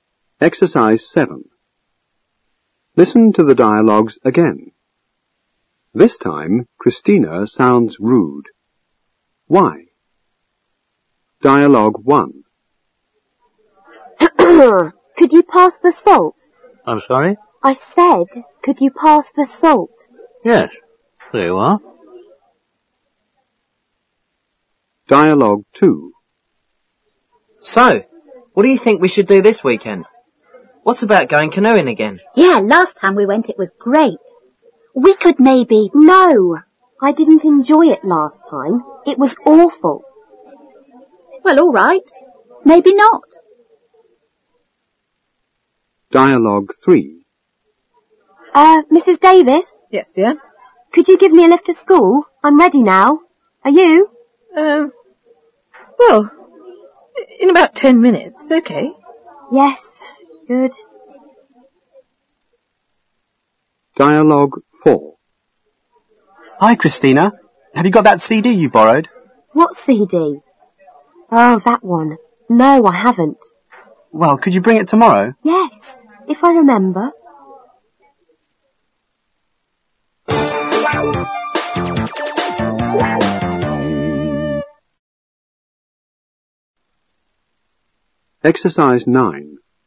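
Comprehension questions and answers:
7.Listen to the dialogues again. This time Christina sounds rude. Why?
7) This time Christina sounds rude. Why?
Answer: She doesn't use polite expressions such as please, thank you or sorry; she is too direct.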